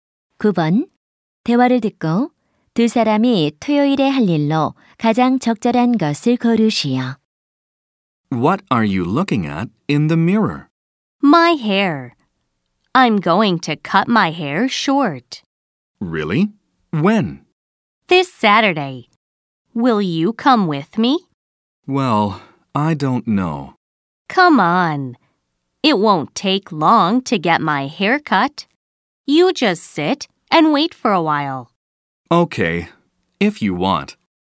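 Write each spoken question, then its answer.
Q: 대화를 듣고 두 사람이 토요일에 할 일로 가장 적절한 것을 고르시오.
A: 미용실에 가서 머리 자르기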